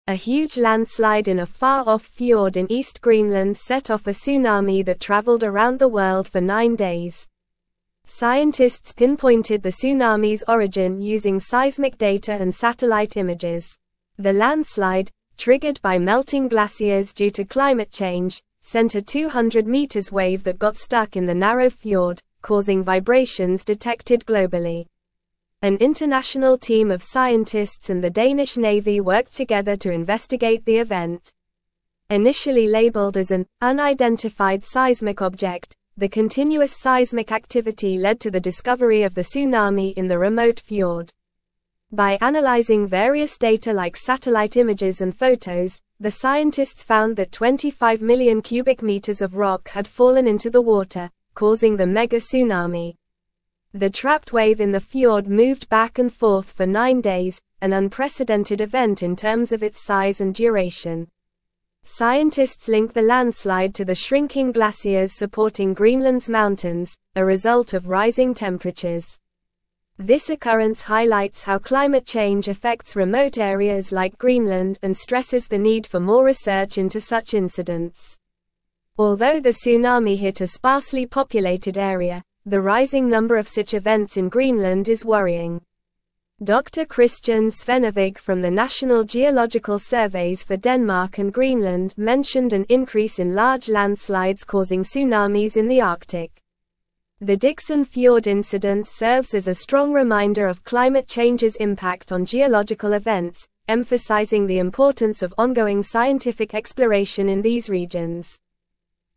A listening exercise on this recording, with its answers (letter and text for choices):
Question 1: How long did the tsunami caused by the Greenland landslide travel for?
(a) Nine days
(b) Five days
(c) Two weeks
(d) One month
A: (a) Nine days

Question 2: What triggered the landslide in East Greenland?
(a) Earthquake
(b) Volcanic eruption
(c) Melting glaciers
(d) Tornado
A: (c) Melting glaciers

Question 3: How did scientists locate the origin of the tsunami?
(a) Weather balloons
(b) Seismic data and satellite images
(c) Telescope observations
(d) Underwater drones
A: (b) Seismic data and satellite images

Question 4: What caused the vibrations detected globally by scientists?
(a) A passing ship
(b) A meteor shower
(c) A submarine earthquake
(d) The stuck wave in the narrow fjord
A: (d) The stuck wave in the narrow fjord

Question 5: How many cubic meters of rock fell into the water during the Greenland landslide?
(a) 10 thousand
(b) 25 million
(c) 50 million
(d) 5 million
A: (b) 25 million

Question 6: What is the link between the landslide and climate change?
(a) Shrinking glaciers due to rising temperatures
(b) Increased rainfall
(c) Strong winds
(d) Soil erosion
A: (a) Shrinking glaciers due to rising temperatures

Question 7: Who worked together to investigate the tsunami event in Greenland?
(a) Local fishermen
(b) Tourists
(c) Construction workers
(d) An international team of scientists and the Danish Navy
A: (d) An international team of scientists and the Danish Navy

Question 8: What does Dr. Kristian Svennevig warn about in relation to Greenland's geological events?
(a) Decrease in volcanic activity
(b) Rise in earthquakes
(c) An increase in large landslides causing tsunamis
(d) More tornadoes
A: (c) An increase in large landslides causing tsunamis

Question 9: A huge (1)______ in a far-off fjord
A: landslide

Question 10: set off a (2)______ that traveled around the world for nine days.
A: tsunami

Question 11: Scientists (3)______ the tsunami's (4)______ using seismic data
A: pinpointed

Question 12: Scientists (3)______ the tsunami's (4)______ using seismic data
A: origin

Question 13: worked together to (5)______ the (6)______.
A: investigate

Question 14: worked together to (5)______ the (6)______.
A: event

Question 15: the scientists (7)______ that 25 million cubic meters of rock had fallen into the water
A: found

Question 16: The (8)______ wave in the fjord moved back and forth for nine days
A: trapped

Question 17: Scientists link the landslide to the shrinking (9)______ supporting (10)______'s mountains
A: glaciers

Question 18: Scientists link the landslide to the shrinking (9)______ supporting (10)______'s mountains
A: Greenland

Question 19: (11)______ the need for more research into such (12)______.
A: stresses

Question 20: (11)______ the need for more research into such (12)______.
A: incidents

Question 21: National Geological Surveys for (13)______ and Greenland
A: Denmark

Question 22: The Dickson Fjord (14)______ serves as a (15)______ reminder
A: incident

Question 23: The Dickson Fjord (14)______ serves as a (15)______ reminder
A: strong

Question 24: climate change's impact on (16)______ events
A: geological

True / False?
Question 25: The trapped wave in the fjord moved back and forth for nine days, which was a unique and lengthy occurrence.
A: True

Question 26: A massive landslide in East Greenland caused a tsunami that traveled globally for nine days.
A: True

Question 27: The tsunami wave was 200 meters tall and got stuck in a narrow fjord, causing vibrations worldwide.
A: True

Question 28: The landslide was triggered by melting icebergs due to climate change.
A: False

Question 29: An international team of scientists and the Swedish Navy worked together to investigate the event.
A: False

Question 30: The incident in Jones Fjord highlights the impact of climate change on geological events and the need for less research in remote areas like Greenland.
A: False

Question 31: The landslide is connected to shrinking glaciers in Greenland due to rising temperatures.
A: True

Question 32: Researchers used seismic data and drone footage to figure out where the tsunami started.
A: False

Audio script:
A huge landslide in a far-off fjord in East Greenland set off a tsunami that traveled around the world for nine days. Scientists pinpointed the tsunami's origin using seismic data and satellite images. The landslide, triggered by melting glaciers due to climate change, sent a 200m wave that got stuck in the narrow fjord, causing vibrations detected globally.
An international team of scientists and the Danish Navy worked together to investigate the event. Initially labeled as an "unidentified seismic object," the continuous seismic activity led to the discovery of the tsunami in the remote fjord. By analyzing various data like satellite images and photos, the scientists found that 25 million cubic meters of rock had fallen into the water, causing the mega-tsunami.
The trapped wave in the fjord moved back and forth for nine days, an unprecedented event in terms of its size and duration. Scientists link the landslide to the shrinking glaciers supporting Greenland's mountains, a result of rising temperatures. This occurrence highlights how climate change affects remote areas like Greenland and stresses the need for more research into such incidents.
Although the tsunami hit a sparsely populated area, the rising number of such events in Greenland is worrying. Dr. Kristian Svennevig from the National Geological Surveys for Denmark and Greenland mentioned an increase in large landslides causing tsunamis in the Arctic. The Dickson Fjord incident serves as a strong reminder of climate change's impact on geological events, emphasizing the importance of ongoing scientific exploration in these regions.

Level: Level 3